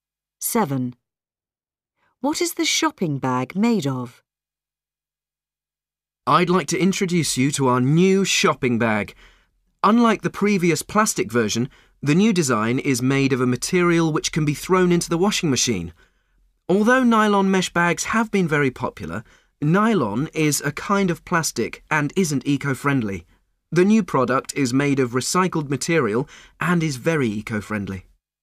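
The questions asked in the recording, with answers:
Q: What is the shopping bag made of?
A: Recycled material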